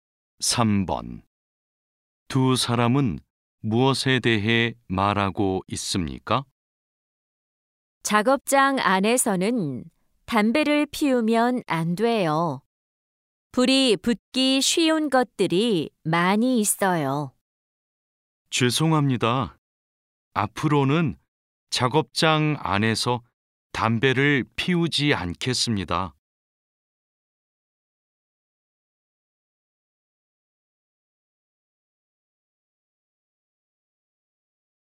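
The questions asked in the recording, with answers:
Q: 두 사람은 무엇에 대해 말하고 있습니까?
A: 작업장 안에서의 금연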